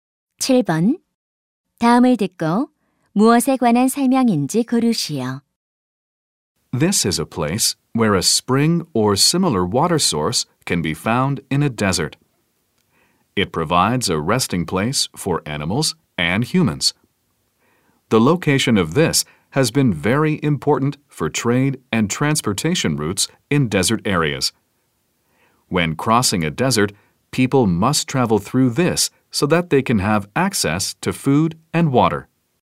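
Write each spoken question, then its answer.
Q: 다음을 듣고 무엇에 관한 설명인지 고르시오.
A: 오아시스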